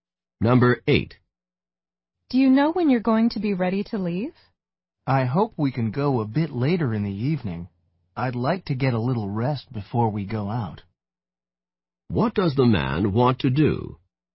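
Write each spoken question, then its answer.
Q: What does the man want to do?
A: Rest before leaving later in the evening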